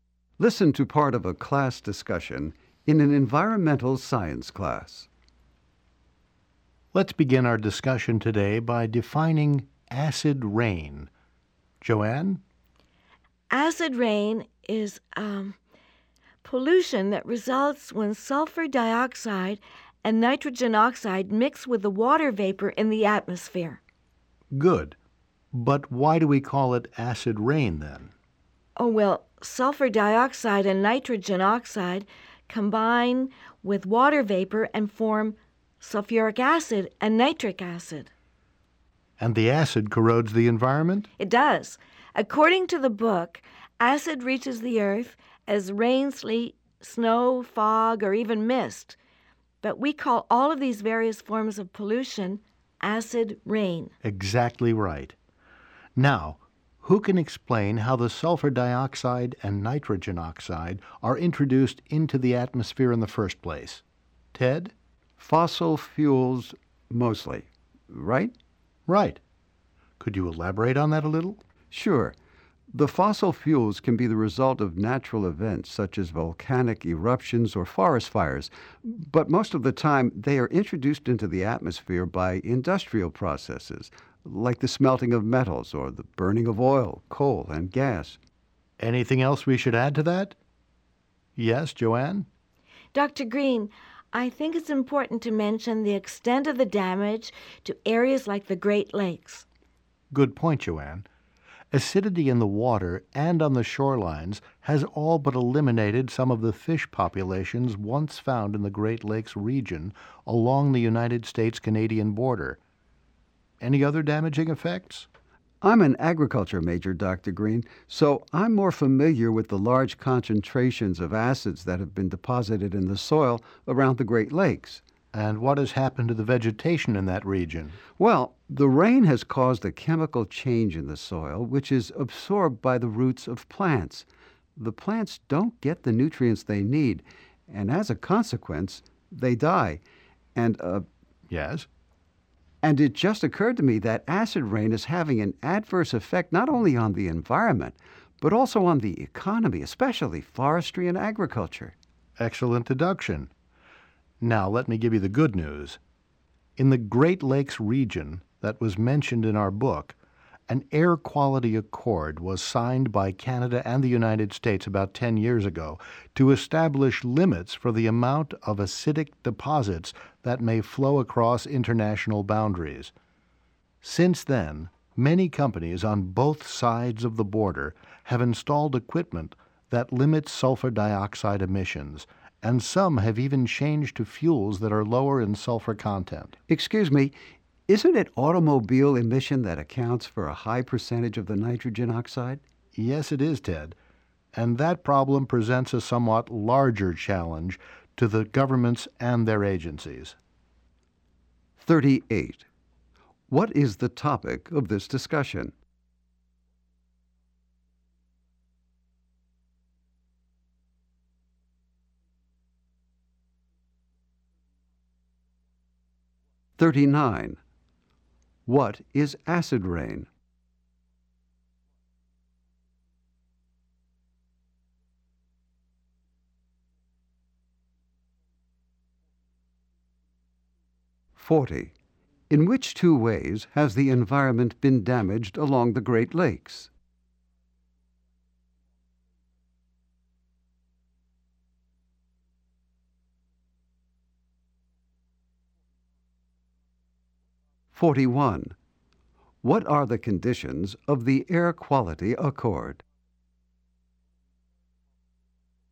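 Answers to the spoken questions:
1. Acid rain.
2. Pollution formed when sulfur dioxide and nitrogen oxide mix with water vapor in the atmosphere.
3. Fish populations have been reduced, and plants have died because of acid in the soil.
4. Limits on acidic deposits crossing the borders between Canada and the United States.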